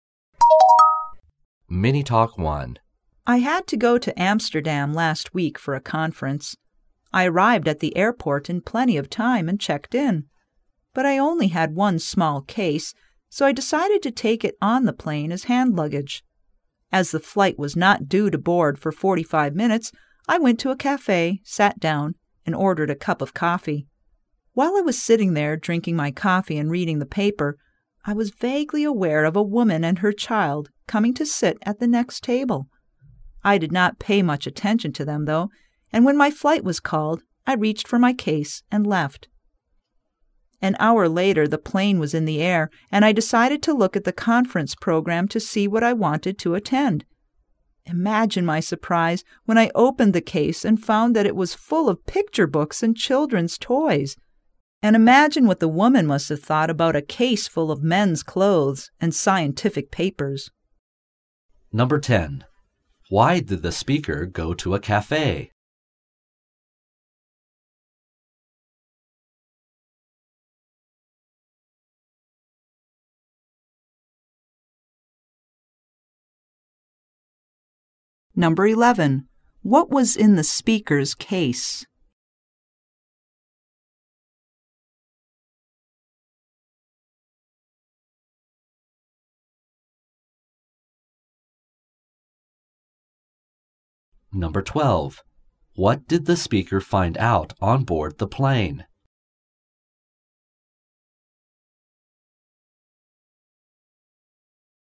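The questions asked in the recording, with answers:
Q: Why did the speaker go to a cafe?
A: Because his flight was not due to board for 45 minutes, so he had time to wait

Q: What was in the speaker's case?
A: Men's clothes and scientific papers

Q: What did the speaker find out on board the plane?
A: He had taken the wrong case, which was full of picture books and children's toys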